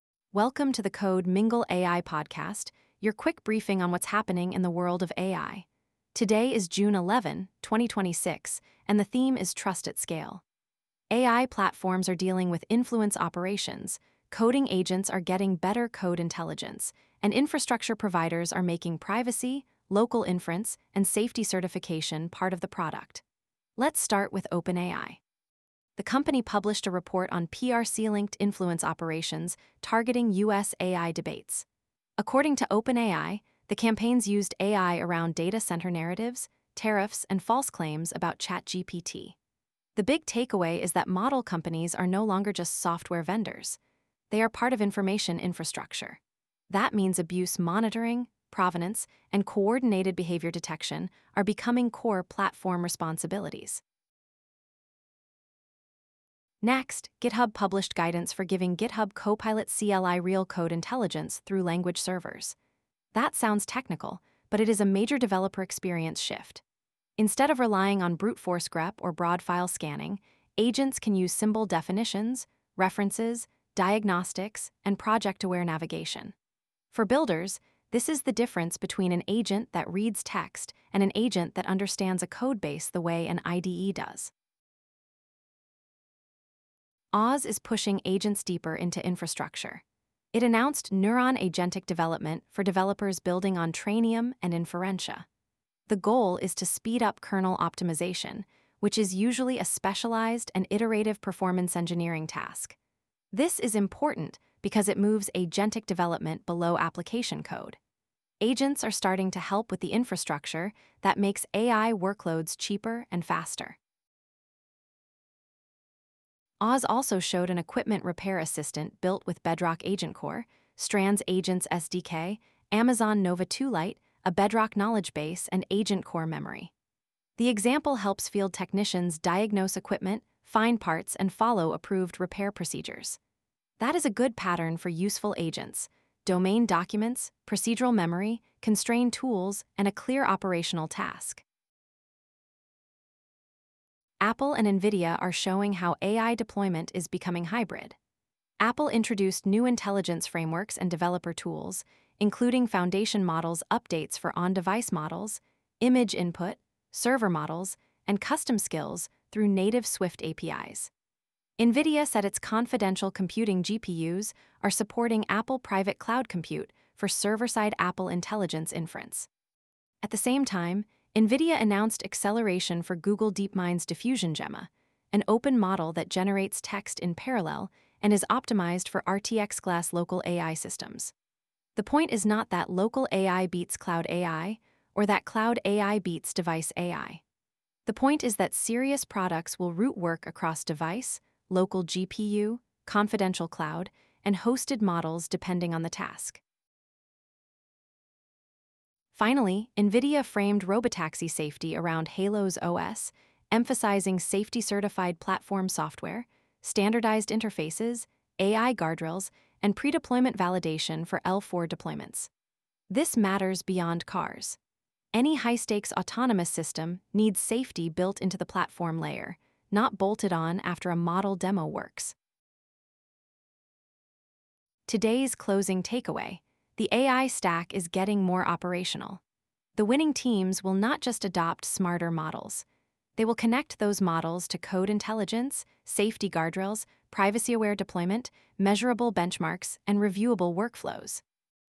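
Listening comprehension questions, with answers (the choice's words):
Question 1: What was the key concern in OpenAI's report on PRC-linked influence operations?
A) AI was used to target U.S. technology debates, including data center narratives, tariffs, and false claims about ChatGPT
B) OpenAI announced that ChatGPT would stop answering political questions globally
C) A new open-source model defeated all frontier benchmarks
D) A cloud provider discontinued GPU services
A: AI was used to target U.S. technology debates, including data center narratives, tariffs, and false claims about ChatGPT

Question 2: Why do language servers matter for GitHub Copilot CLI agents?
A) They let agents ignore source code and rely only on chat history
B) They provide code intelligence such as symbols, references, diagnostics, and project-aware navigation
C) They replace all tests with static screenshots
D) They make terminal commands unnecessary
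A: They provide code intelligence such as symbols, references, diagnostics, and project-aware navigation

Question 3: What is notable about AWS Neuron Agentic Development?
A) It applies agents to Trainium and Inferentia kernel optimization rather than only application-level coding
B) It is a consumer chatbot for shopping recommendations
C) It removes the need for accelerators in AI workloads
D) It is a new programming language for mobile apps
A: It applies agents to Trainium and Inferentia kernel optimization rather than only application-level coding

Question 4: What deployment pattern is reinforced by Apple's intelligence frameworks and NVIDIA's Private Cloud Compute work?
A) Every AI feature should run on one remote model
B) AI applications increasingly need routing across on-device, confidential cloud, and local GPU inference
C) Privacy no longer matters for personal AI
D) Developers should avoid native APIs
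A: AI applications increasingly need routing across on-device, confidential cloud, and local GPU inference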